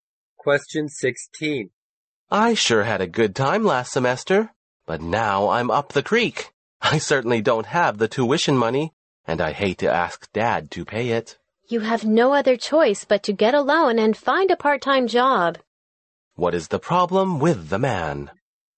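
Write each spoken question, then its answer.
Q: What is the problem with the man?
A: He doesn't have money for tuition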